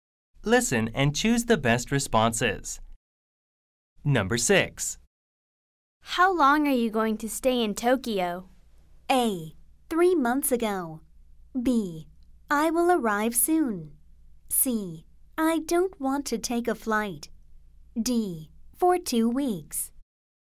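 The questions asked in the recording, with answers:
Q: How long are you going to stay in Tokyo?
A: D: For 2 weeks.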